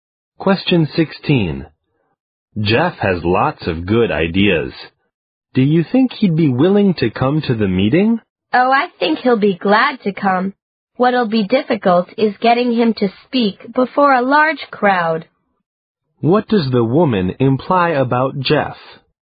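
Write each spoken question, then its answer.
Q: What does the woman imply about Jeff?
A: He is reluctant to speak before a large crowd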